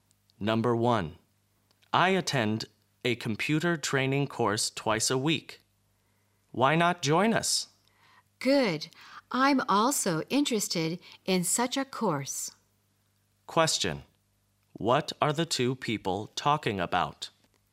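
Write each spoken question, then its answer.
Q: What are the 2 people talking about?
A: A computer training course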